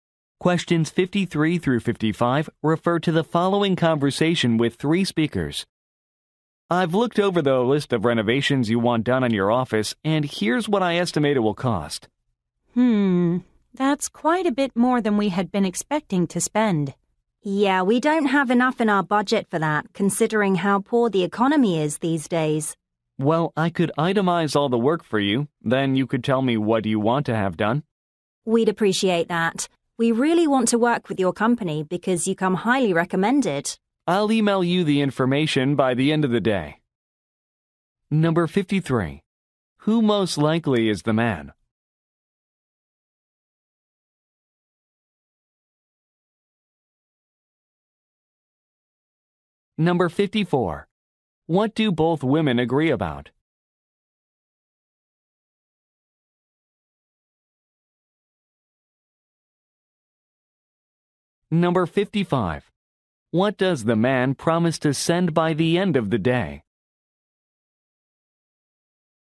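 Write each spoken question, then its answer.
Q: Who most likely is the man?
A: A renovation contractor

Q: What do both women agree about?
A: The estimate is too expensive for their budget

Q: What does the man promise to send by the end of the day?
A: An itemized list of the work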